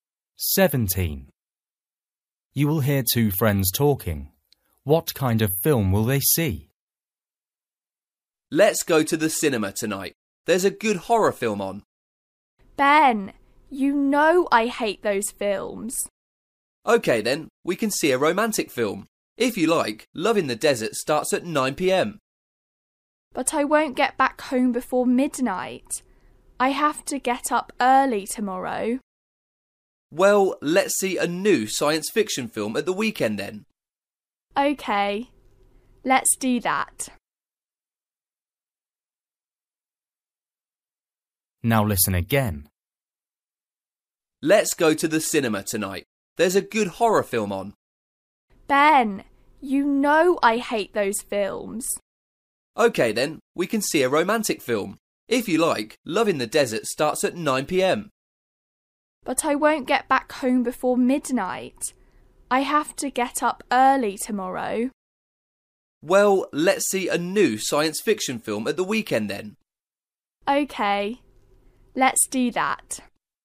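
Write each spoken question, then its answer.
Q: What kind of film will they see?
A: A science fiction film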